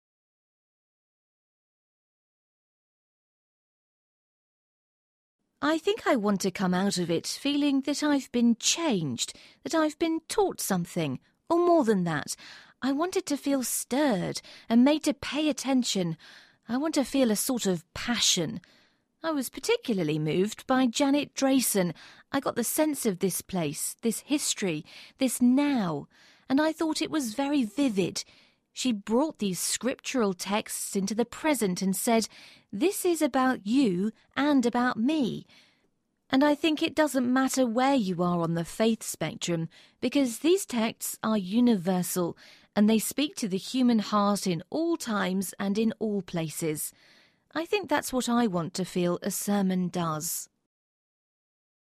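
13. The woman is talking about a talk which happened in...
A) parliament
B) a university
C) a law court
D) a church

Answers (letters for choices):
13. D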